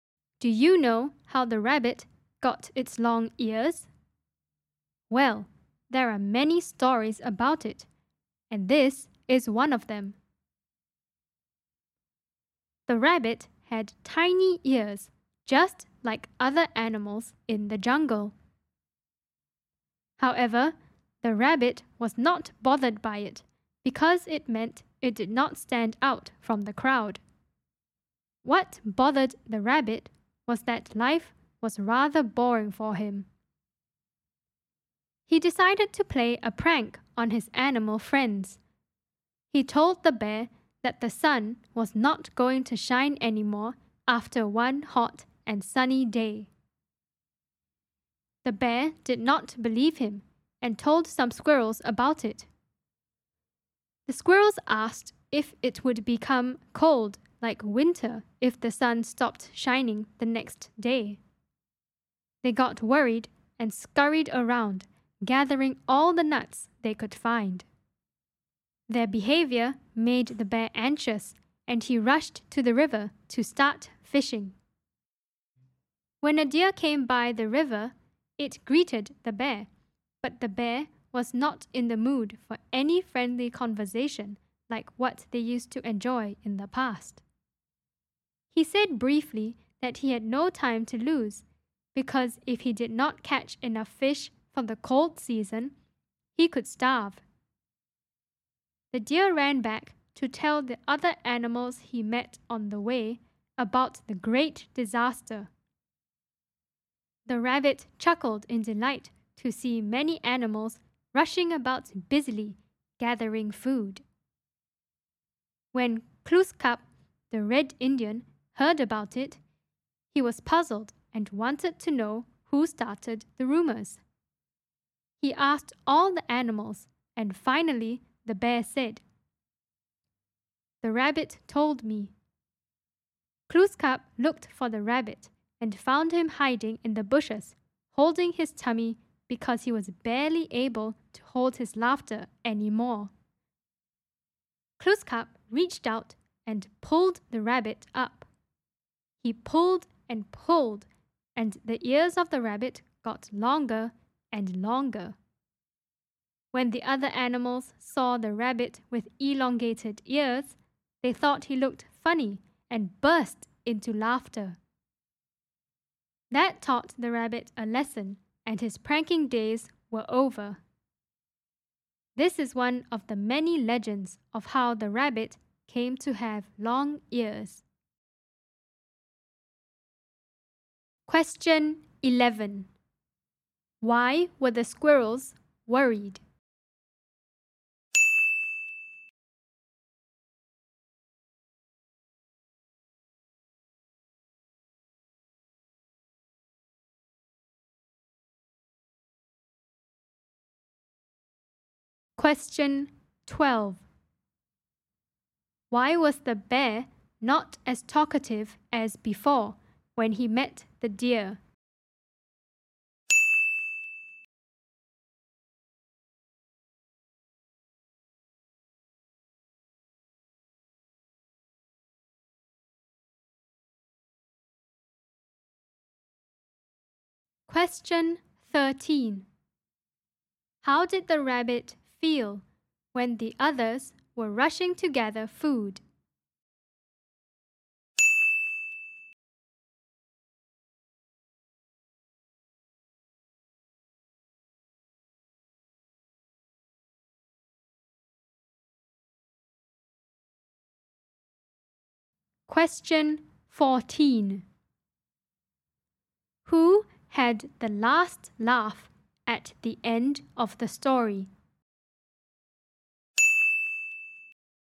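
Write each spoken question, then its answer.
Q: Why were the squirrels worried?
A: They thought it would become cold like winter if the sun stopped shining

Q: Why was the bear not as talkative as before when he met the deer?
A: He had no time to lose; he had to catch enough fish for the cold season or he could starve

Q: How did the rabbit feel when the others were rushing to gather food?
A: Delighted / amused

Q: Who had the last laugh at the end of the story?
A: The other animals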